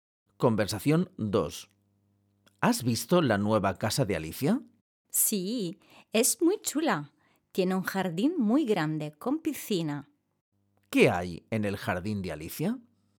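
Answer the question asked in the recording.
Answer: Una piscina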